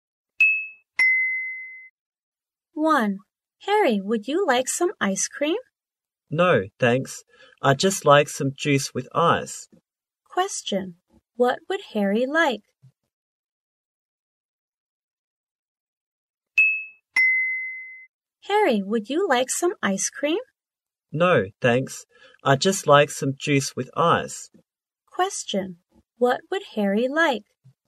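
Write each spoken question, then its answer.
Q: What would Harry like?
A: Some juice with ice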